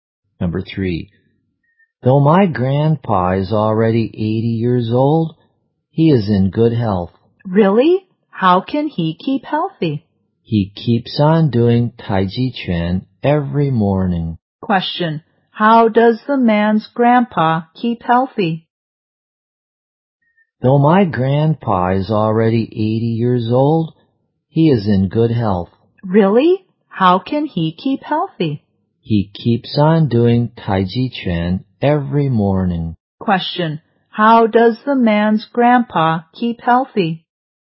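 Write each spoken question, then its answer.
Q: how does the man's grandpa keep healthy?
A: By doing Tai Chi Chuan every morning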